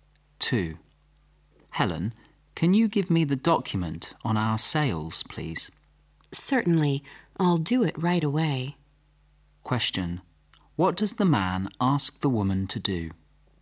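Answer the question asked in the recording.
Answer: Give him the document on their sales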